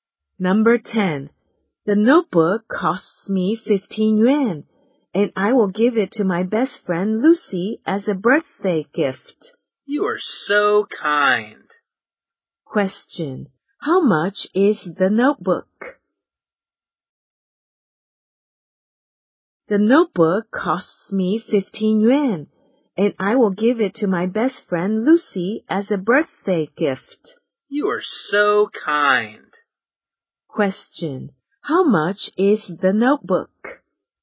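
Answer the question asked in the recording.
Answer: 15 yuan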